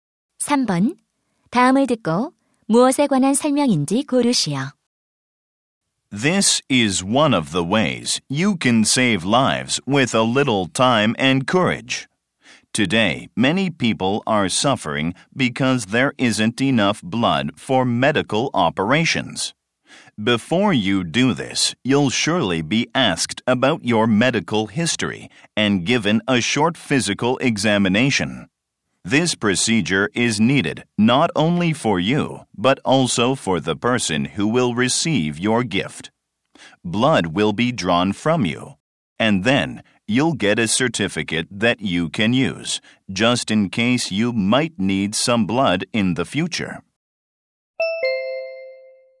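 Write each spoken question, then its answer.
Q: 다음을 듣고 무엇에 관한 설명인지 고르시오.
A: 헌혈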